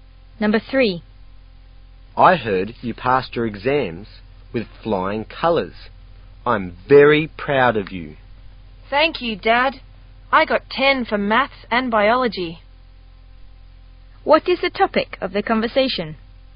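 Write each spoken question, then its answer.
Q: What is the topic of the conversation?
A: The son's exam results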